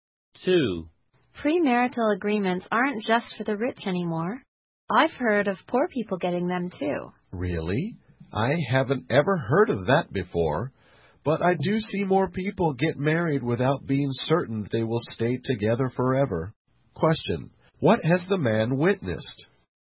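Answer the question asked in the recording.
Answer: More people getting married without being certain they will stay together forever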